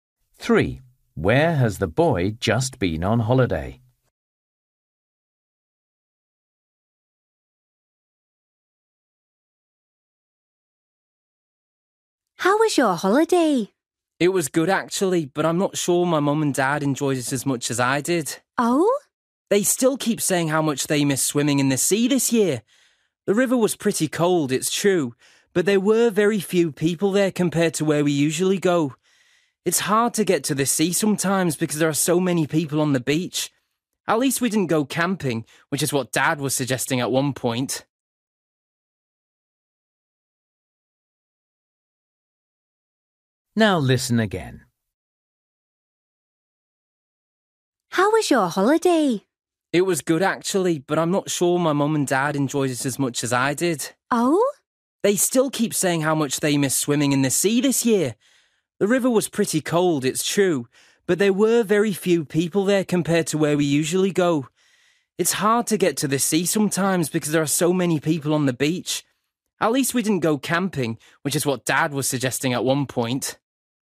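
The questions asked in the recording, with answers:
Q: Where has the boy just been on holiday?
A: By a river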